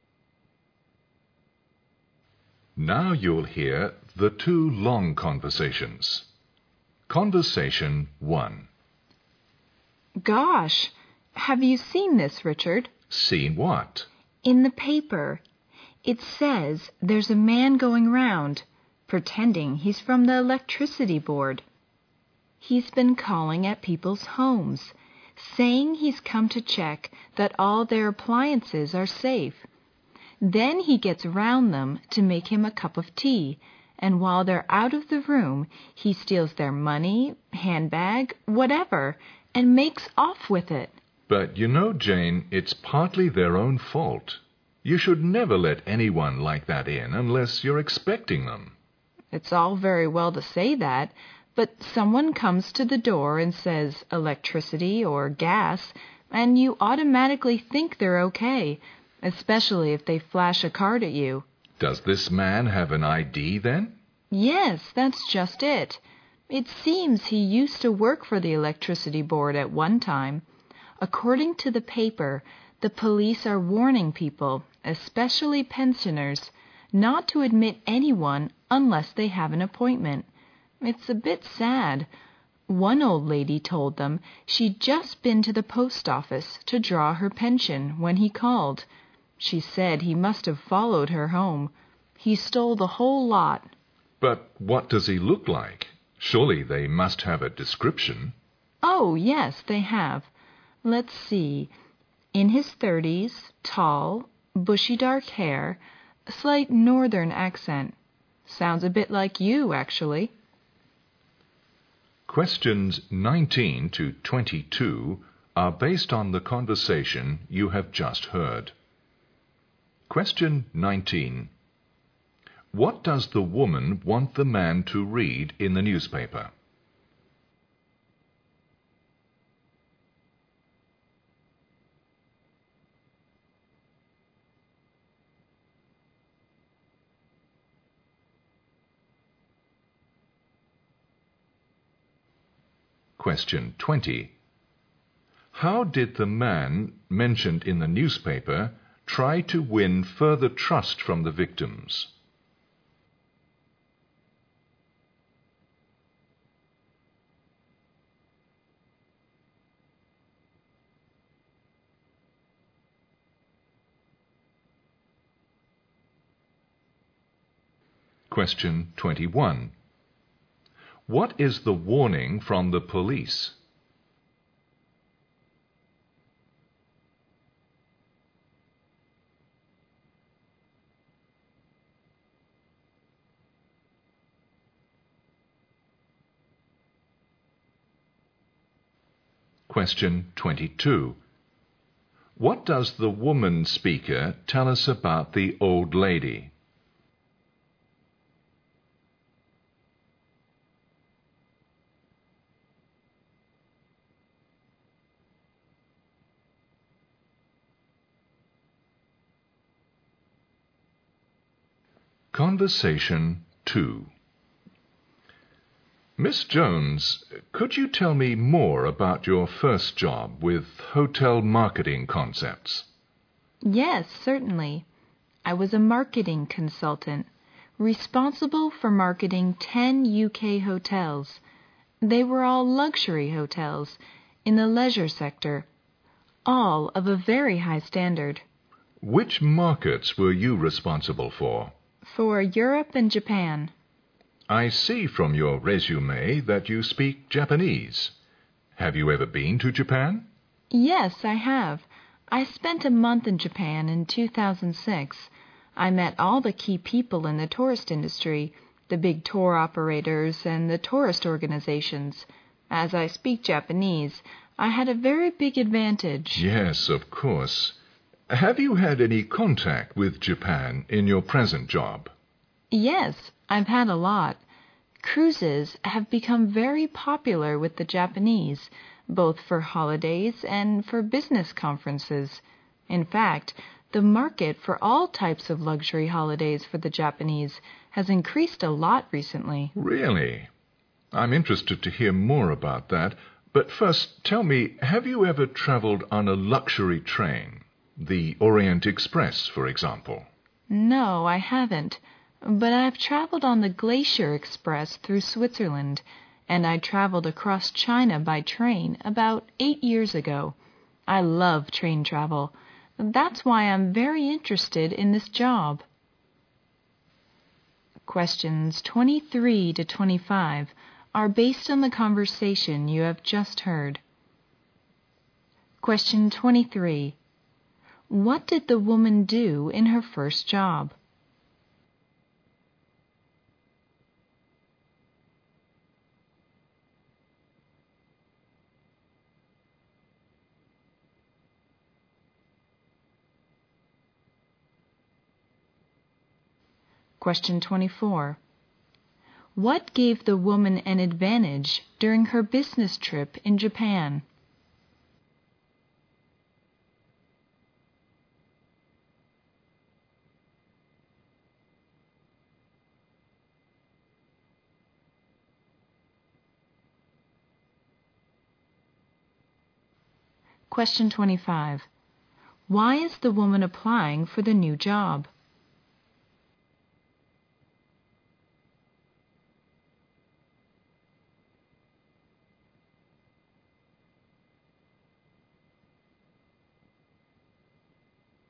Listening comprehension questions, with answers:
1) What does the woman want the man to read in the newspaper?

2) How did the man mentioned in the newspaper try to win further trust from the victims?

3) What is the warning from the police?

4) What does the woman speaker tell us about the old lady?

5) What did the woman do in her first job?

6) What gave the woman an advantage during her business trip in Japan?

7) Why is the woman applying for the new job?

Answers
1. A theft case
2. Flashing his I.D. to them
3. not to admit anyone unless they have an appointment
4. Her pension has been stolen by the man
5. marketing consultant
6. She can speak Japanese
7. She loves train travel.

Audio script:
W: Gosh! Have you seen this Richard?
W: In the paper, it says there's a man going round pretending he's from the electricity board. He's been calling at people's homes, saying he's come to check that all their appliances are safe. Then he gets around them to make him a cup of tea and while they are out of the room, he steals their money, handbag, whatever and makes off with it.
M: But you know Jane, it's partly their own fault. You should never let anyone like that in unless you are expecting them.
W: It's all very well to say that, but someone comes to the door and says electricity or gas, and you automatically think they are ok, especially if they flash a card to you.
M: Does this man have an I. D. then?
W: Yes, that's just it! It seems he used to work for the electricity board at one time. According to the paper, the police are warning people, especially pensioners not to admit anyone unless they have an appointment. It's a bit sad. One old lady told them she'd just been to the post office to draw her pension when he called. She said he must have followed her home. He stole the whole lot.
M: But what does he look like? Surely they must have a description.
W: Oh, yes, they have. Let's see. In his thirties, tall, bushy dark hair, slight northern accent, sounds a bit like you actually.
Q19. What does the woman want the man to read in the newspaper? (A theft case)
(Flashing his I.D. to them)
What does the woman speaker tell us about the old lady?(Her pension has been stolen by the man)
Conversation Two
M: Miss Jones, could you tell me more about your first job with hotel marketing concepts?
W: Yes certainly. I was a marketing consultant, responsible for marketing ten UK hotels. They were all luxury hotels in the leisure sector, all of a very high standard.
M: Which markets were you responsible for?
W: For Europe and Japan.
M: I see from your resume that you speak Japanese. Have you ever been to Japan?
W: Yes, I have. I spent a month in Japan in 2006. I met all the key people in the tourist industry, the big tour operators and tourist organizations. As I speak Japanese, I had a very big advantage.
M: Yes, of course. Have you had any contact with Japan in your present job?
W: Yes, I've had a lot. The truth is I have become very popular with the Japanese, both for holidays and for business conferences. In fact, the market for all types of luxury holidays for the Japanese has increased a lot recently.
M: Really, I'm interested to hear more about that, but first, tell me, have you ever traveled on a luxury train? The Orient Express, for example.
W: No I haven't, but I have traveled on a glacier express to Switzerland and I traveled across China by train about 8 years ago. I love train travel. That's why I'm very interested in this job.
Q23. What did the woman do in her first job?(marketing consultant)
What gave the woman an advantage during her business trip in Japan?(She can speak Japanese)
Q25. Why is the woman applying for the new job? (She loves train travel.)